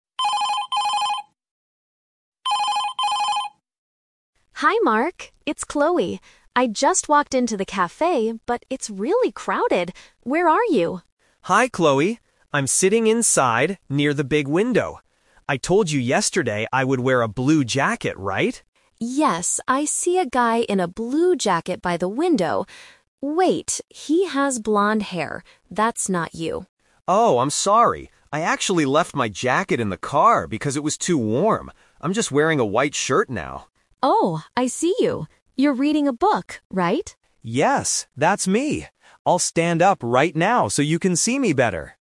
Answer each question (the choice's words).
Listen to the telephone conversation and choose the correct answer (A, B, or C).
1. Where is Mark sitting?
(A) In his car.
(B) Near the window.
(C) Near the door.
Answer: Near the window.

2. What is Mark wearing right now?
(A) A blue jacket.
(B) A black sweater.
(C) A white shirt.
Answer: A white shirt.

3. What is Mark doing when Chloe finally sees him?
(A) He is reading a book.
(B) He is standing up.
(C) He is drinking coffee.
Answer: He is reading a book.

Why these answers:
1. Mark clearly states, "I'm sitting inside, near the big window." The Trap: Option (A) is a trap because the word "car" is mentioned later when he explains where he left his jacket. Option (C) is plausible because Chloe "just walked into the cafe", but it is not where Mark is sitting.
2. Mark uses the "Twist" here. He says, "I'm just wearing a white shirt now." The Trap: Option (A) "A blue jacket" is what he promised to wear and what Chloe is looking for at first, but he left it in the car.
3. Chloe asks, "You're reading a book, right?" and Mark confirms, "Yes, that's me!" The Trap: Option (B) "standing up" is a trap. He says "I'll stand up right now" which means he will do it after she sees him, not while she is looking for him.

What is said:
Chloe: Hi Mark! It's Chloe. I just walked into the cafe, but it's really crowded. Where are you?
Mark: Hi Chloe! I'm sitting inside, near the big window. I told you yesterday I would wear a blue jacket, right?
Chloe: Yes, I see a guy in a blue jacket by the window... wait, he has blonde hair. That's not you.
Mark: Oh, I'm sorry! I actually left my jacket in the car because it was too warm. I'm just wearing a white shirt now.
Chloe: Oh, I see you! You're reading a book, right?